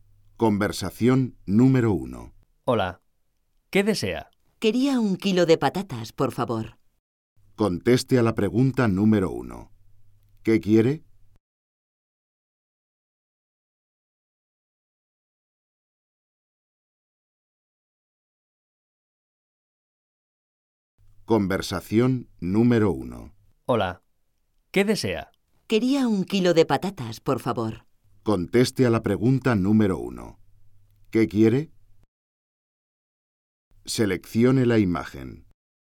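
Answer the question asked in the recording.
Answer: Un kilo de patatas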